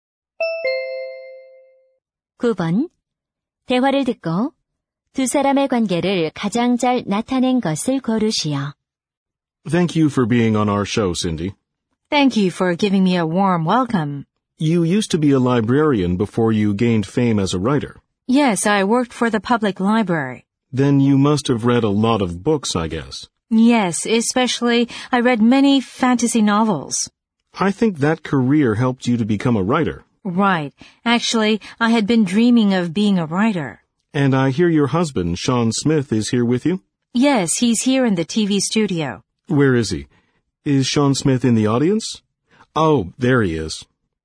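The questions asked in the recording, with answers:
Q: 대화를 듣고 두 사람의 관계를 가장 잘 나타낸 것을 고르시오.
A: 토크쇼 진행자와 작가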